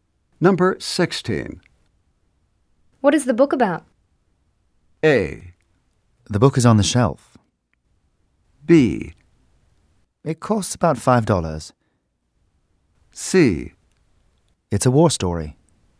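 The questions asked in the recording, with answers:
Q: What is the book about?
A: C: It's a war story.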